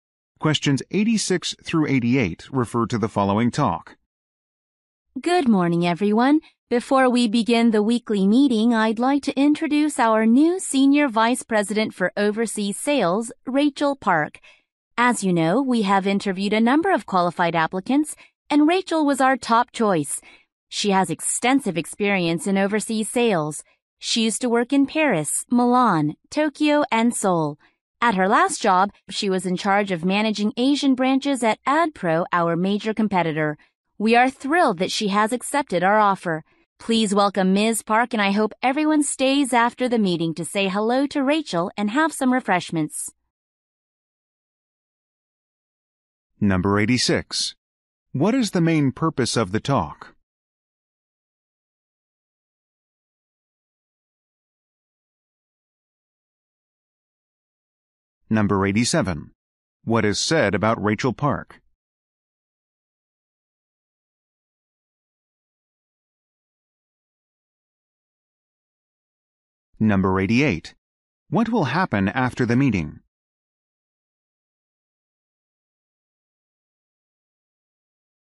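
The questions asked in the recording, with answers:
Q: What is the main purpose of the talk?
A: To introduce a new senior vice president

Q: What is said about Rachel Park?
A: She has extensive experience in overseas sales.

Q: What will happen after the meeting?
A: Staff will greet Rachel and have refreshments.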